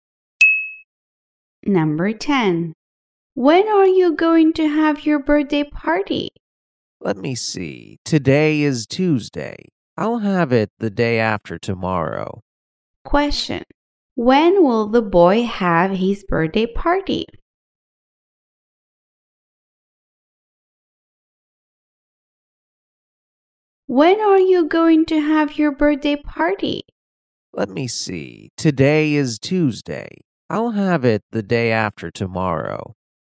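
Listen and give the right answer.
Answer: On Thursday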